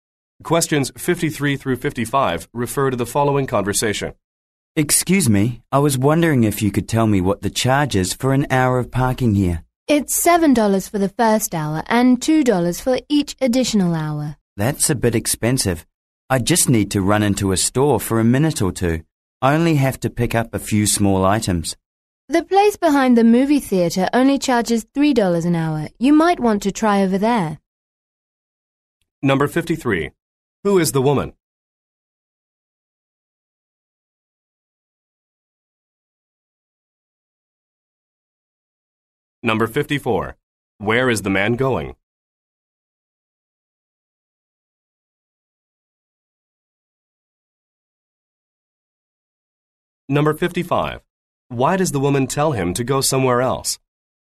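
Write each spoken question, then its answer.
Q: Who is the woman?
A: A parking lot attendant

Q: Where is the man going?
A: To a store

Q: Why does the woman tell him to go somewhere else?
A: Parking there is cheaper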